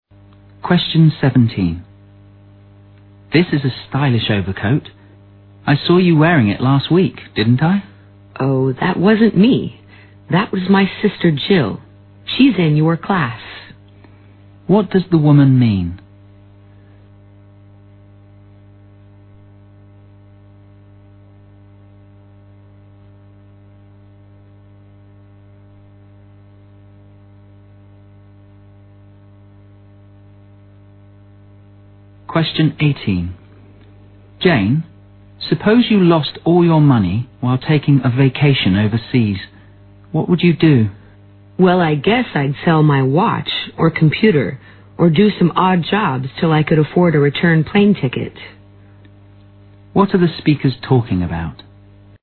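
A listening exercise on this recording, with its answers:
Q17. What does the woman mean?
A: Jill wore the overcoat last week.

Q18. What are the speakers talking about?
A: An imaginary situation.

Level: 大学英语四级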